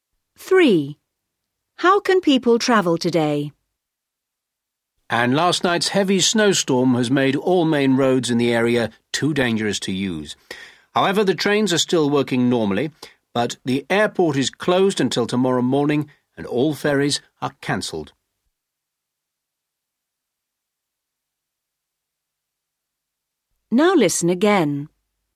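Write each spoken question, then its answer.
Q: How can people travel today?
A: By train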